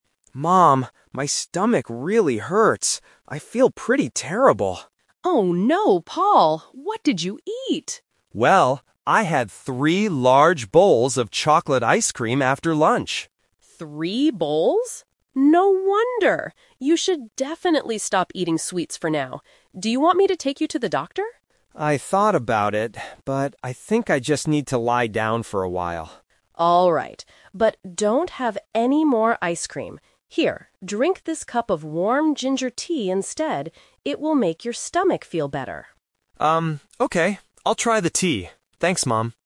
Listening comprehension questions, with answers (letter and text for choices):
Listen to the conversation between a mother and her son. Choose the correct answer (A, B, or C) for each question.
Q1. Why does Paul have a stomachache?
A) He didn't have lunch today.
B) He ate a lot of chocolate ice cream.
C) He drank too much cold water.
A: B) He ate a lot of chocolate ice cream.

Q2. What did Paul first think about doing?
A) Going to see a doctor.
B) Drinking some ginger tea.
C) Going out with his friends.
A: A) Going to see a doctor.

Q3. What is the mother's advice?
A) To eat more sweets to feel better.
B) To go to the hospital immediately.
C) To drink warm ginger tea and stop eating ice cream.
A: C) To drink warm ginger tea and stop eating ice cream.

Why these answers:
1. Paul says he had "three large bowls of chocolate ice cream after lunch," which caused his stomachache. Trap A is wrong: He ate ice cream "after lunch," so he did have lunch. Trap C is wrong: Cold water is not mentioned in the script.
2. When the mother asks if he wants to see a doctor, Paul says, "I thought about it, but..." This indicates it was his first thought before deciding to just lie down. Trap B is wrong: Ginger tea is the mother's suggestion, not Paul's first thought. Trap C is wrong: This is not mentioned in the script.
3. The mother tells him, "don't have any more ice cream" and "drink this cup of warm ginger tea instead." Trap A is wrong: The mother says he should "stop eating sweets." Trap B is wrong: Although the mother asks if he wants to go to the doctor, Paul rejects it, and they decide he will stay home.

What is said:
Boy: Mom, my stomach really hurts. I feel pretty terrible.
Mother: Oh no, Paul! What did you eat?
Boy: Well, I had three large bowls of chocolate ice cream after lunch.
No wonder! You should definitely stop eating sweets for now. Do you want me to take you to the doctor?
Boy: I thought about it, but I think I just need to lie down for a while.
But don't have any more ice cream. Here, drink this cup of warm ginger tea instead. It will make your stomach feel better.